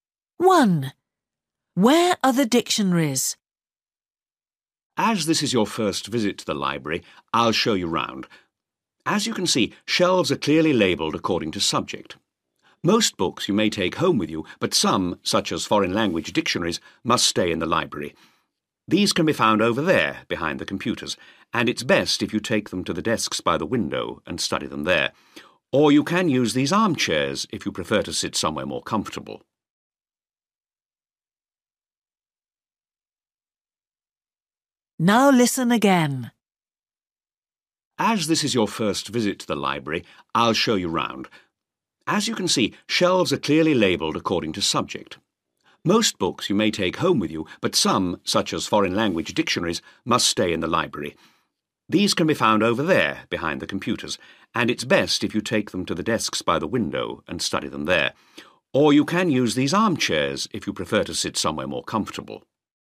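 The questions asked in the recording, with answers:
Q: Where are the dictionaries?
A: Behind the computers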